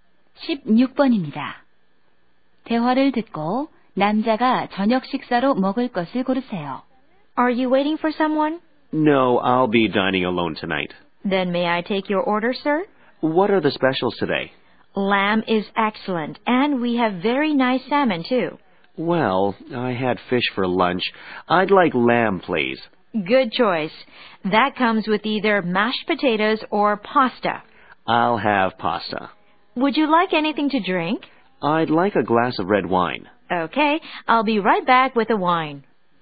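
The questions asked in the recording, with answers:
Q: 대화를 듣고 남자가 저녁 식사로 먹을 것을 고르세요.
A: 양고기와 파스타, 레드 와인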